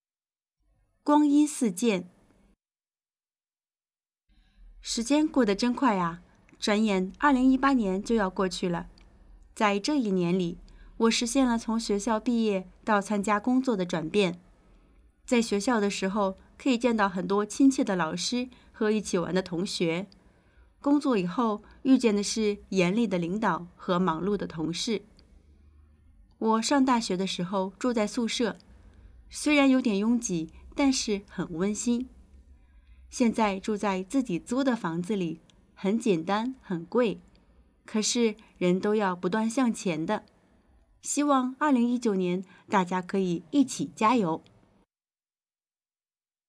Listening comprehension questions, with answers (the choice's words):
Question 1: 我现在的工作是什么?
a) 学生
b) 老师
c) 出租房子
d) 没有提到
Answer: 没有提到

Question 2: 我的转变不包括什么?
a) 从毕业到参加工作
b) 从接触老师和同学到领导与同事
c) 工资从低到高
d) 住的地方从宿舍到租住房子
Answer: 工资从低到高

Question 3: 可以推断,我什么时间写的这篇文章?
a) 2018年6月初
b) 2019年1月初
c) 2018年12月底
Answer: 2018年12月底

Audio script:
在这一年里,我实现了从学校毕业到参加工作的转变。在学校的时候可以见到很多亲切的老师和一起玩的同学。工作以后,遇见的是严厉的领导和忙碌的同事。
在学校的时候可以见到很多亲切的老师和一起玩的同学。工作以后,遇见的是严厉的领导和忙碌的同事。 我上大学的时候,住在宿舍,虽然有点拥挤,但是很温馨。 现在住在自己租的房子里,很简单很贵。可是,人都要不断向前的,希望2019年,大家可以一起加油!